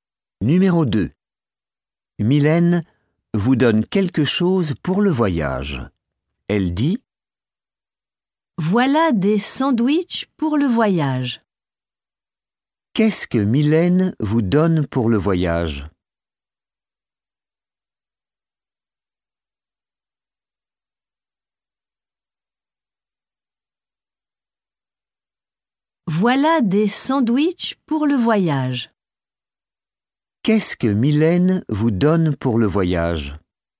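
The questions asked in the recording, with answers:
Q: Qu'est-ce que Mylène vous donne pour le voyage?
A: Des sandwichs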